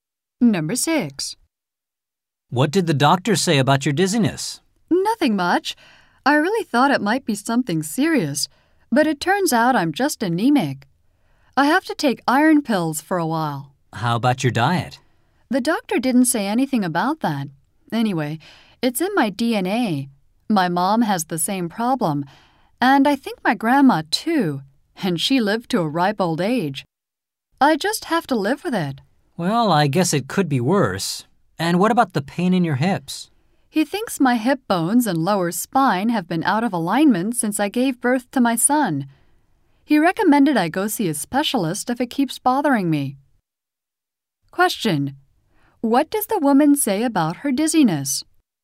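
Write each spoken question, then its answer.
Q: What does the woman say about her dizziness?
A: It is caused by anemia, which runs in her family.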